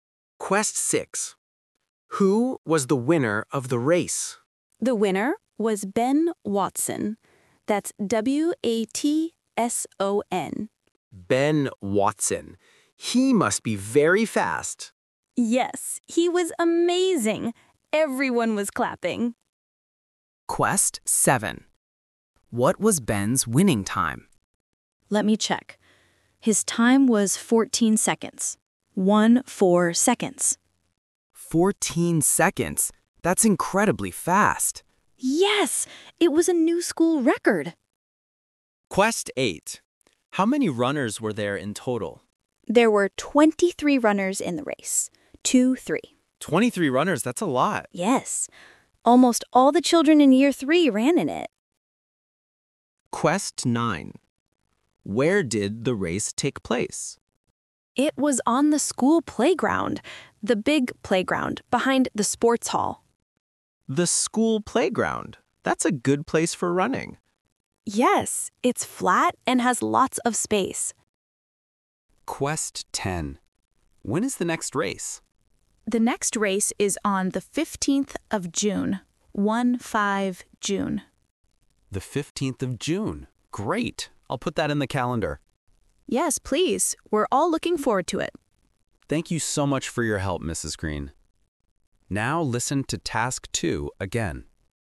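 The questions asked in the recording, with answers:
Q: Who was the winner of the race?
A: Ben Watson

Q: What was Ben's winning time?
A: 14 seconds

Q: How many runners were there in total?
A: 23

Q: Where did the race take place?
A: On the school playground

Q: When is the next race?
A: On the 15th of June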